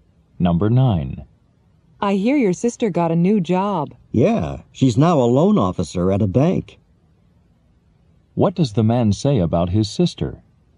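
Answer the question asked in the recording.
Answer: She is a loan officer at a bank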